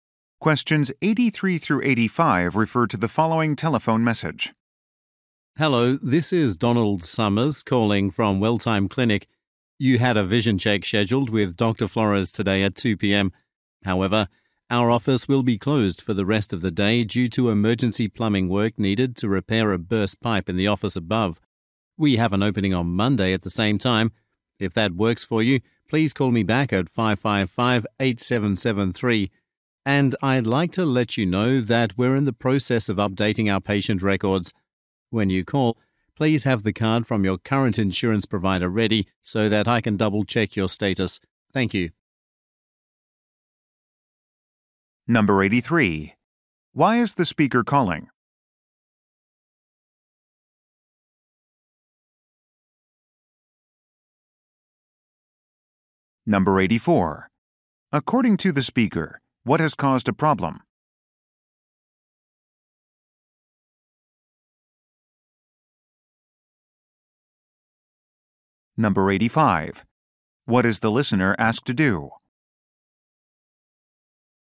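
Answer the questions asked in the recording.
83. To reschedule an appointment
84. A burst pipe needing emergency plumbing work
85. Have the insurance card ready when calling back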